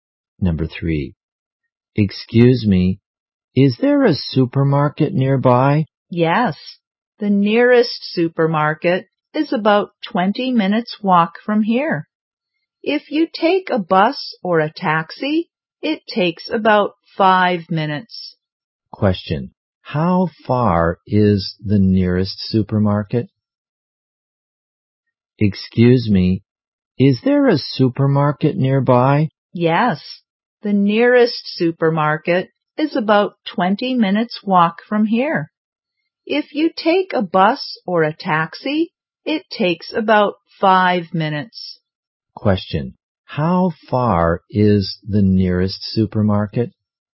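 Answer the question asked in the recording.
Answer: About 20 minutes' walk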